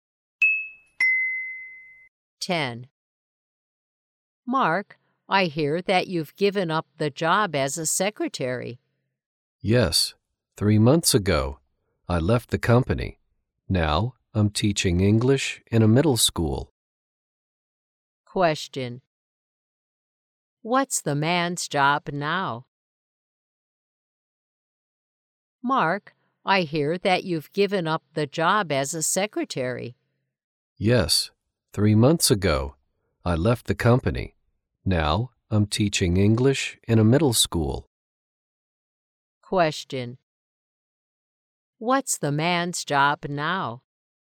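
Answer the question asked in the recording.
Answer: An English teacher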